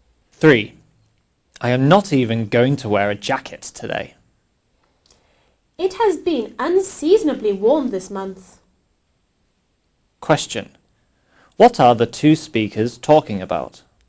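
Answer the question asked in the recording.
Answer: The weather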